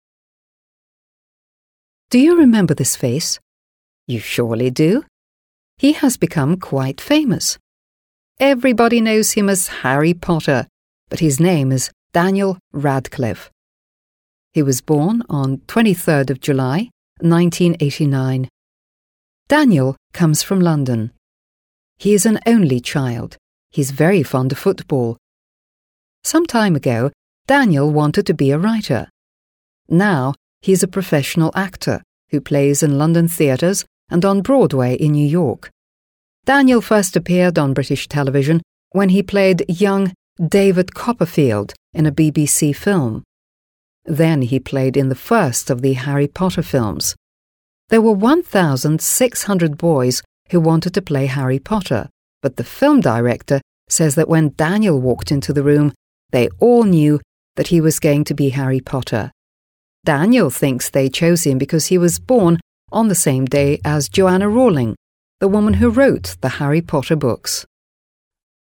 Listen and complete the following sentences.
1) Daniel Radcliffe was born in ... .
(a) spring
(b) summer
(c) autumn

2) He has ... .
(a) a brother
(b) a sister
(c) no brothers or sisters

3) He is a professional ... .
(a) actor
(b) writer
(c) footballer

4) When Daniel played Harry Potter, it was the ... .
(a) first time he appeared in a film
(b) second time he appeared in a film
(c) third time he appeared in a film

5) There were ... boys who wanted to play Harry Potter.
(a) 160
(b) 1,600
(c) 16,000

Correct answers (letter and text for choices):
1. (b) summer
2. (c) no brothers or sisters
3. (a) actor
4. (b) second time he appeared in a film
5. (b) 1,600

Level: 7 Класс